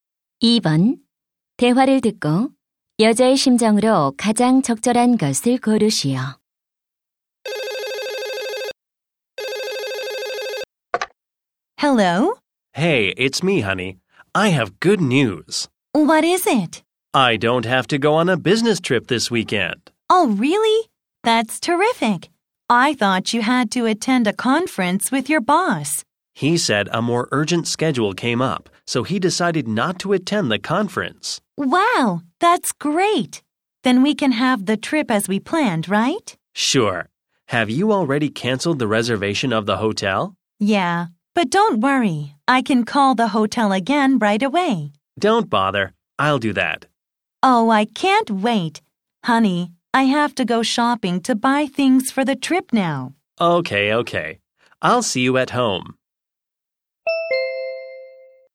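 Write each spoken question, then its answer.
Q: 대화를 듣고 여자의 심정으로 가장 적절한 것을 고르시오.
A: 신남 (excited)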